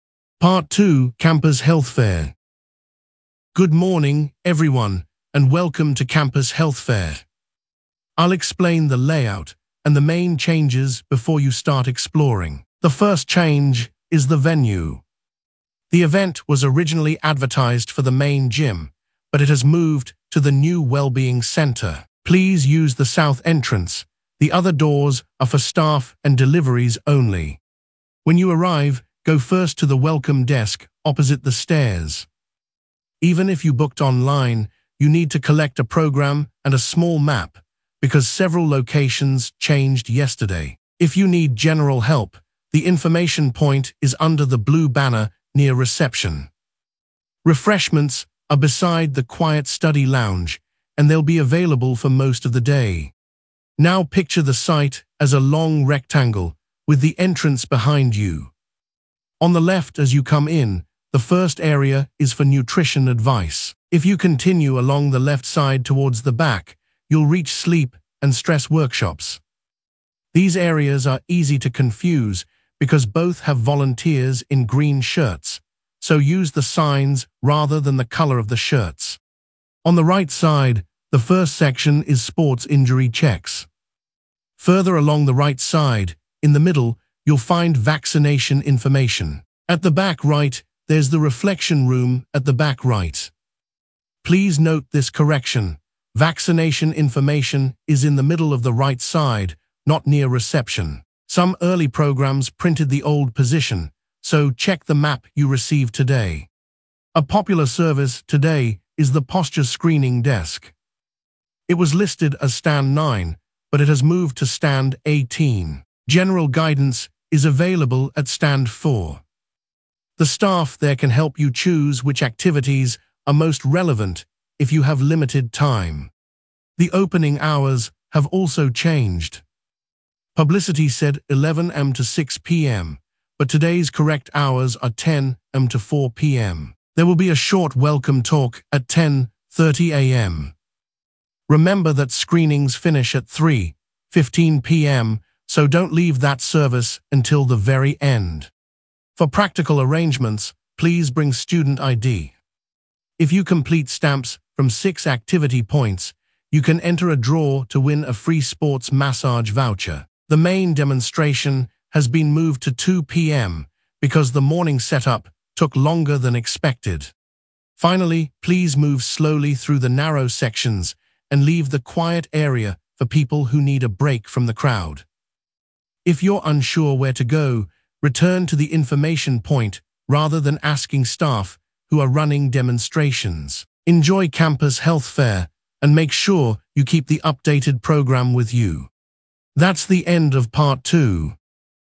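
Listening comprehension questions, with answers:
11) Where is the event taking place?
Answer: the new wellbeing centre

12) Which entrance should visitors use?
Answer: south entrance

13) Where should visitors go first?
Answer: the welcome desk opposite the stairs

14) Where are refreshments located?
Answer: beside the quiet study lounge

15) What is located at the back left?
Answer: sleep and stress workshops

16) Where is the quiet or rest area?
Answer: the reflection room at the back right

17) Where has the special advice or clinic table moved to?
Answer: stand 18

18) What are the correct opening hours?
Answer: 10 am to 4 pm

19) What must visitors bring?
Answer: student ID

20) What time is the main demonstration now?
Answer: 2 pm

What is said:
Part 2: Campus Health Fair
Organiser: Good morning, everyone, and welcome to Campus Health Fair. I will explain the layout and the main changes before you start exploring. 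The first change is the venue. The event was originally advertised for the main gym, but it has moved to the new wellbeing centre. Please use the south entrance; the other doors are for staff and deliveries only.
Organiser: When you arrive, go first to the welcome desk opposite the stairs. Even if you booked online, you need to collect a programme and a small map, because several locations changed yesterday. If you need general help, the information point is under the blue banner near reception. Refreshments are beside the quiet study lounge, and they will be available for most of the day.
Organiser: Now picture the site as a long rectangle, with the entrance behind you. On the left as you come in, the first area is for nutrition advice. If you continue along the left side towards the back, you will reach sleep and stress workshops. These areas are easy to confuse because both have volunteers in green shirts, so use the signs rather than the colour of the shirts.
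Organiser: On the right side, the first section is sports injury checks. Further along the right side, in the middle, you will find vaccination information. At the back right there is the reflection room at the back right. Please note this correction: vaccination information is in the middle of the right side, not near reception. Some early programmes printed the old position, so check the map you receive today.
Organiser: A popular service today is the posture screening desk. It was listed as stand 9, but it has moved to stand 18. General guidance is available at stand 4. The staff there can help you choose which activities are most relevant if you have limited time.
Organiser: The opening hours have also changed. Publicity said 11 am to 6 pm, but today's correct hours are 10 am to 4 pm. There will be a short welcome talk at 10:30 am. Remember that screenings finish at 3:15 pm, so do not leave that service until the very end.
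Organiser: For practical arrangements, please bring student ID. If you complete stamps from six activity points, you can enter a draw to win a free sports massage voucher. The main demonstration has been moved to 2 pm because the morning setup took longer than expected.
Organiser: Finally, please move slowly through the narrow sections and leave the quiet area for people who need a break from the crowd. If you are unsure where to go, return to the information point rather than asking staff who are running demonstrations. Enjoy Campus Health Fair, and make sure you keep the updated programme with you.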